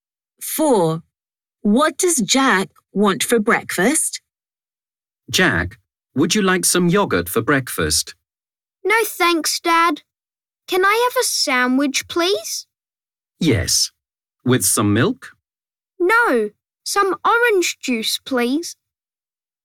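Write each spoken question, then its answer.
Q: What does Jack want for breakfast?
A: a sandwich (with orange juice)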